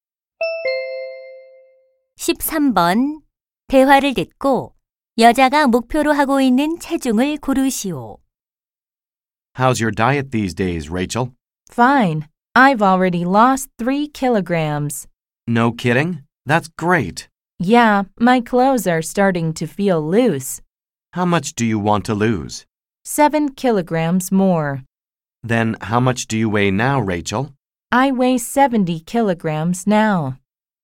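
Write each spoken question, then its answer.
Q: 대화를 듣고 여자가 목표로 하고 있는 체중을 고르시오.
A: 63킬로그램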